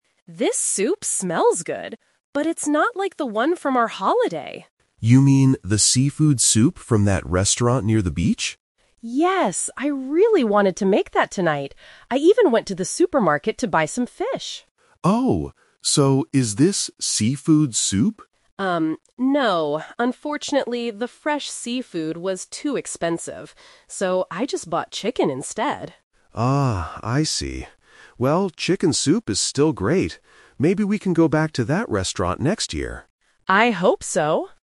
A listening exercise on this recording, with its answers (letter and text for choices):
IListen to a conversation between a husband and wife cooking at home. Choose the correct answer (A, B, or C) for each question.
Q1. What kind of soup did the woman actually make tonight?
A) Seafood soup.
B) Chicken soup.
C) Vegetable soup.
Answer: B) Chicken soup.

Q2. Why didn't she use fish for the soup?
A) The fish cost too much money.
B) The supermarket didn't have any fish.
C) She forgot to go to the supermarket.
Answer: A) The fish cost too much money.

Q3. Where did they eat the soup during their holiday?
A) At the supermarket.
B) At their hotel.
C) At a restaurant near the beach.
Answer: C) At a restaurant near the beach.

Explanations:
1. The wife clearly says, "So, I just bought chicken instead," which means she made chicken soup. Option A is the trap: she "wanted to make" seafood soup, but she didn't. Option C is a plausible type of soup but is never mentioned.
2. The wife explains that "the fresh seafood was too expensive" (expensive = cost too much money). Option C is the trap: she explicitly says, "I even went to the supermarket," so she didn't forget. Option B is plausible but not the reason she gave.
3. The husband asks, "You mean the seafood soup from that restaurant near the beach?" and the wife says, "Yes!". Option A is the trap: the "supermarket" is mentioned in the audio, but that is where the wife went today to buy ingredients, not where they ate on holiday. Option B is not mentioned.

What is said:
Wife: This soup smells good, but it's not like the one from our holiday.
Husband: You mean the seafood soup from that restaurant near the beach?
Wife: Yes! I really wanted to make that tonight. I even went to the supermarket to buy some fish.
Husband: Oh, so is this seafood soup?
Unfortunately, the fresh seafood was too expensive. So, I just bought chicken instead.
Husband: Ah, I see. Well, chicken soup is still great. Maybe we can go back to that restaurant next year.